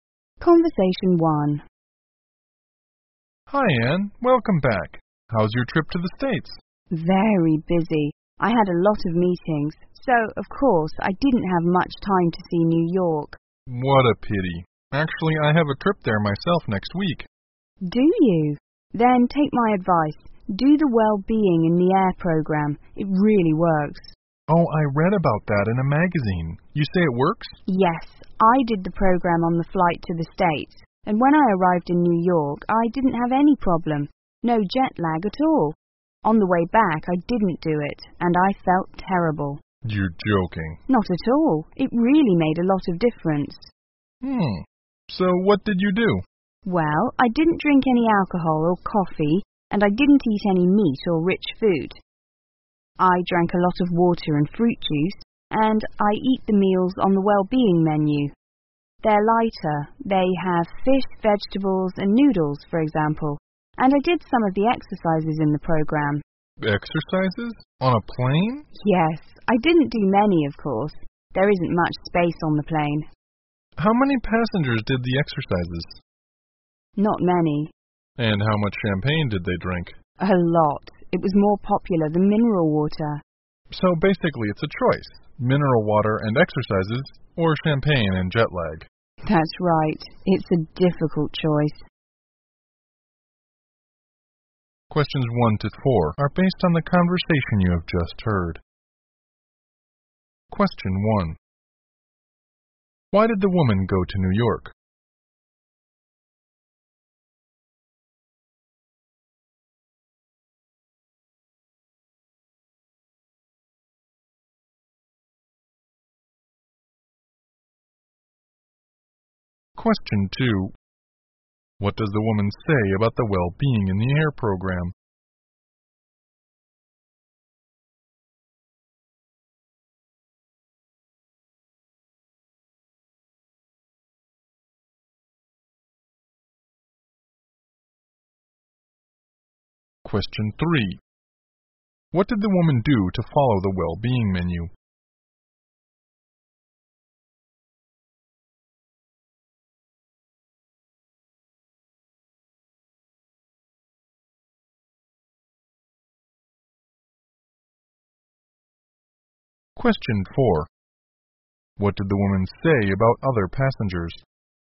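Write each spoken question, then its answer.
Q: Why did the woman go to New York?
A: For business meetings

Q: What does the woman say about the well-being in the air program?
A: It really works; she had no jet lag

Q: What did the woman do to follow the well-being menu?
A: She ate lighter meals like fish, vegetables and noodles, and avoided alcohol, coffee, meat and rich food

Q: What did the woman say about other passengers?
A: Not many did the exercises; they drank a lot of champagne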